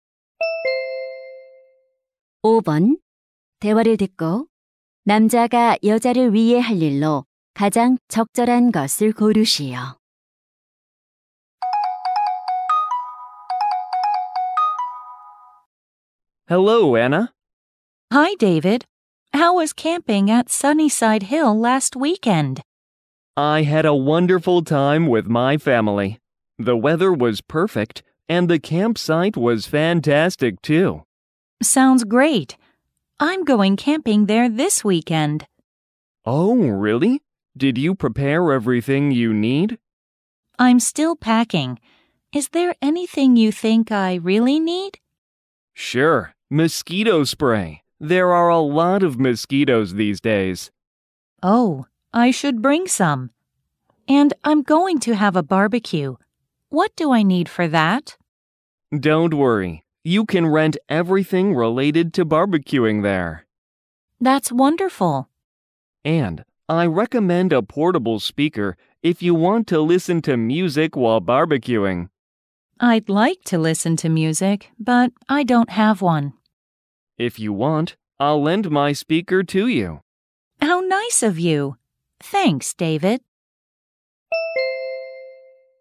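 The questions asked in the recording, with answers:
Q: 대화를 듣고 남자가 여자를 위해 할 일로 가장 적절한 것을 고르시오.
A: 휴대용 스피커 빌려주기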